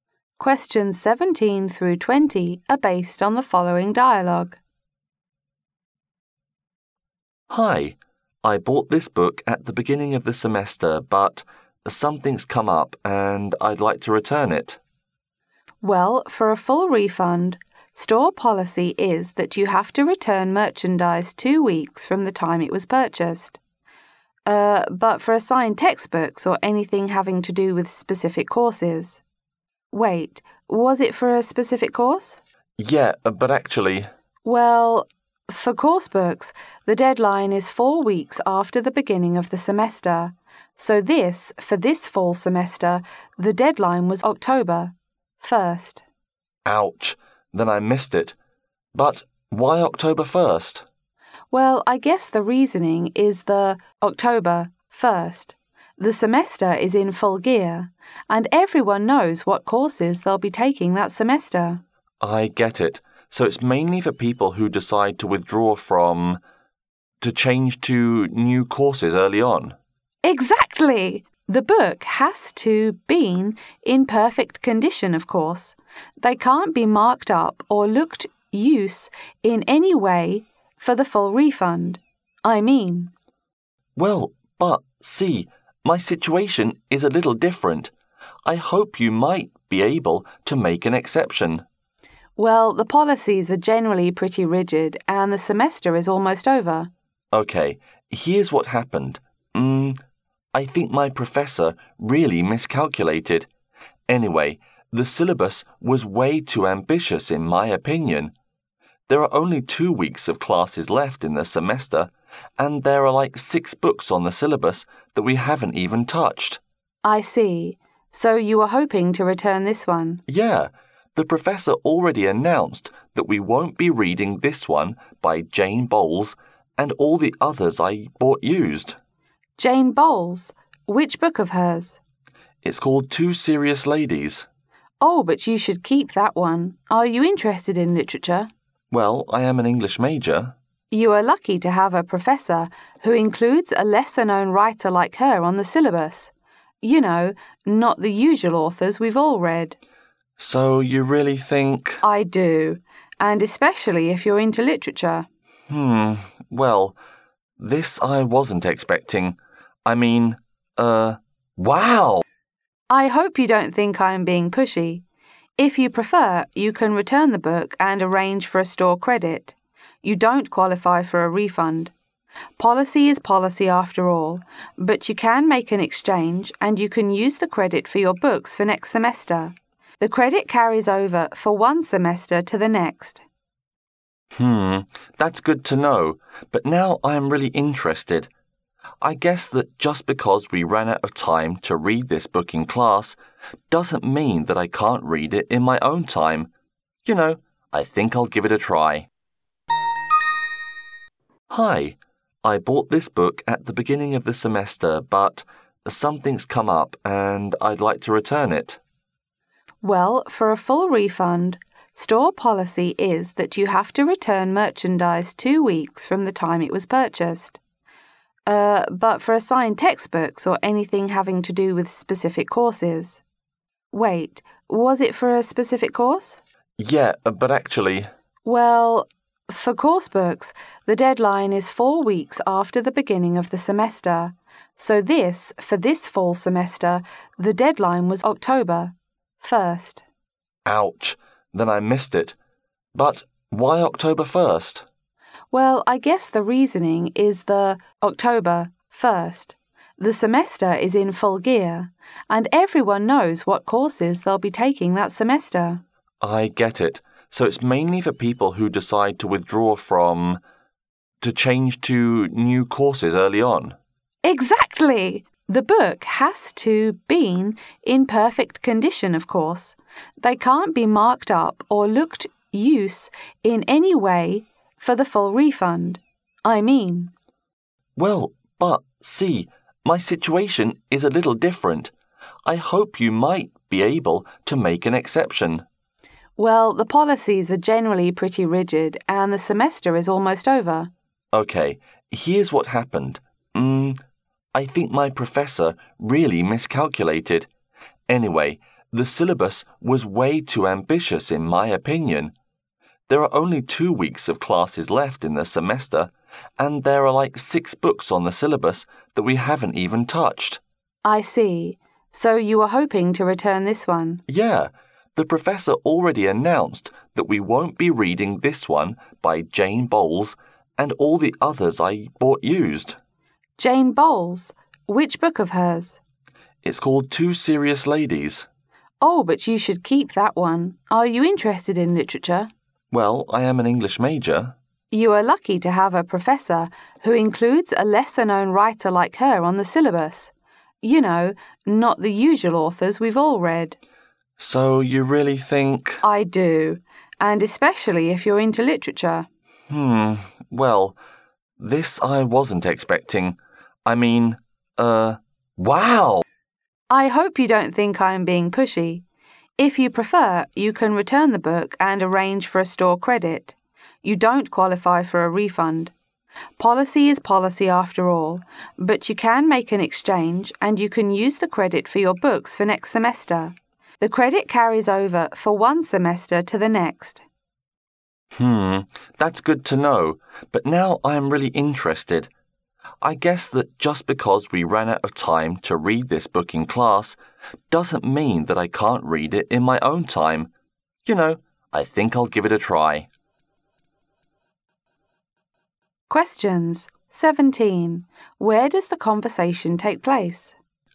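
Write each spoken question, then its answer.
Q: Where does the conversation take place?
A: In a bookstore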